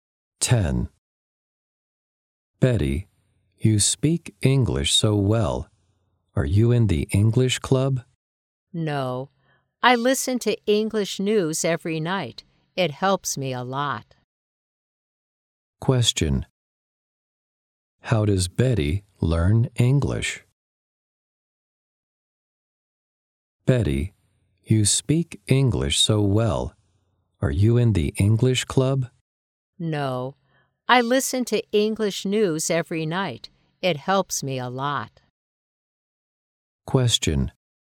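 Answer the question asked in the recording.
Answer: By listening to English news every night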